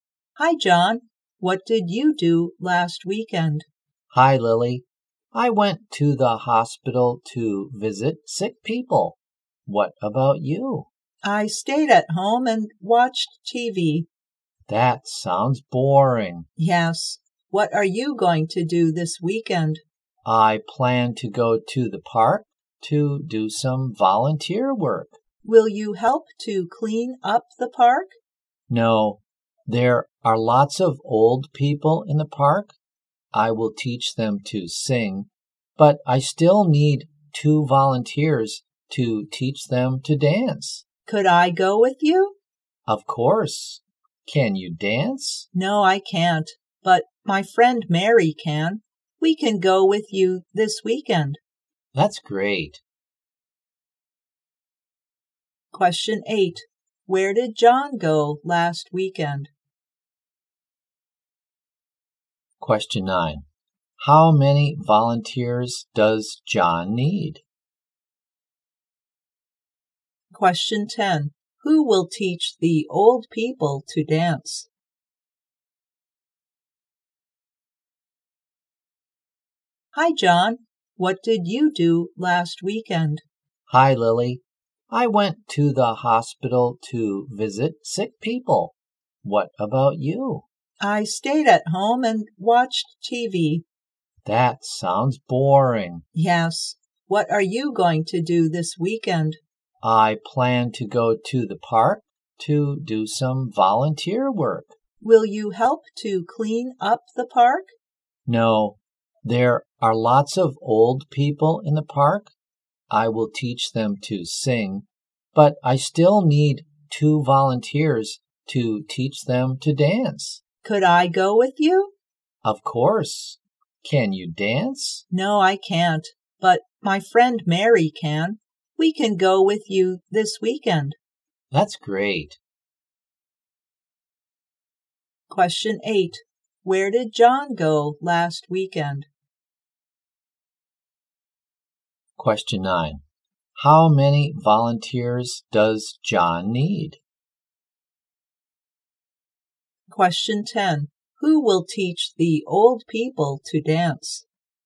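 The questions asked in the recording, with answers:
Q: Where did John go last weekend?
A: To the hospital

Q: How many volunteers does John need?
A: Two

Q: Who will teach the old people to dance?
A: Mary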